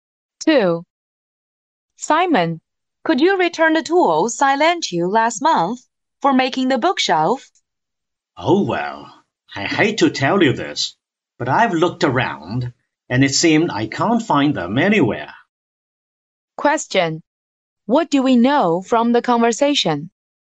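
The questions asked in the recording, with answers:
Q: What do we know from the conversation?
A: Simon can't find the tools he borrowed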